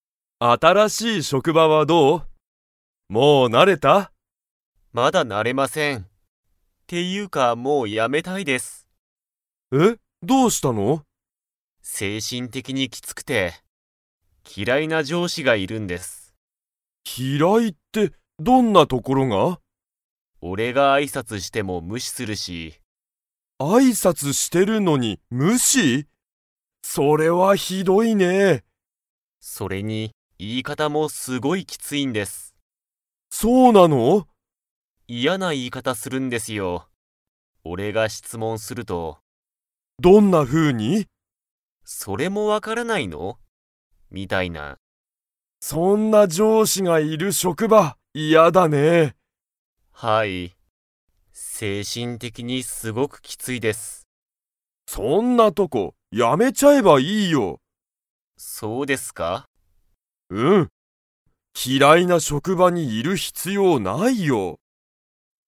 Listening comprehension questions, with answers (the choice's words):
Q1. タカシは職場しょくばに 上司じょうしがいる。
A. 嫌きらいな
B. 優やさしい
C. 辞やめちゃう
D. 大好だいすきな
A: 嫌きらいな

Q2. その上司じょうしは、タカシの挨拶あいさつを無視むししますか?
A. はい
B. いいえ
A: はい

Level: Level 4